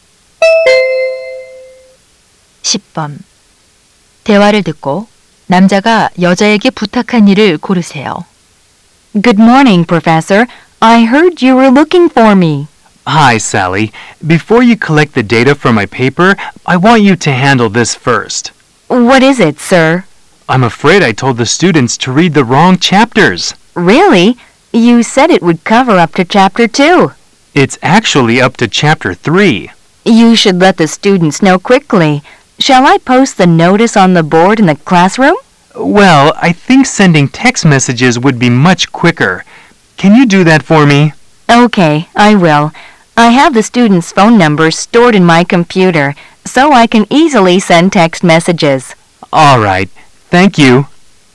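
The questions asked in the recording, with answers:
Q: 대화를 듣고 남자가 여자에게 부탁한 일을 고르세요.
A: 학생들에게 문자 메시지 보내기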